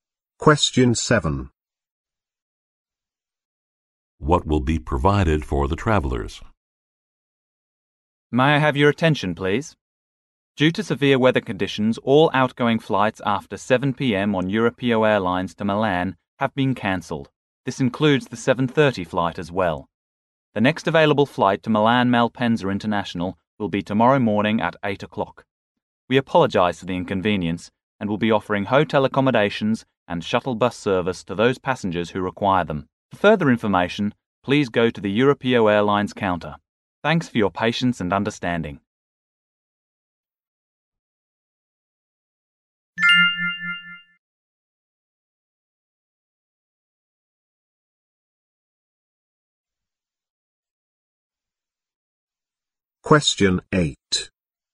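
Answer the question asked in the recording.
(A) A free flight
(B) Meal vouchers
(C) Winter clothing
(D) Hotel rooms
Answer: (D) Hotel rooms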